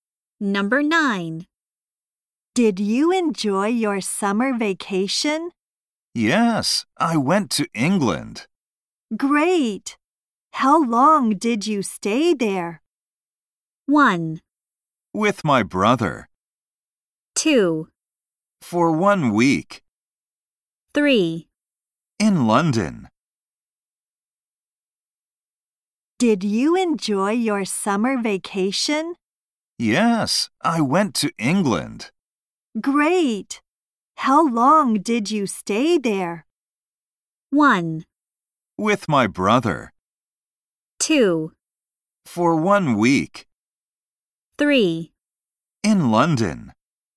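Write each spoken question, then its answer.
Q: Great! How long did you stay there?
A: 2: For 1 week.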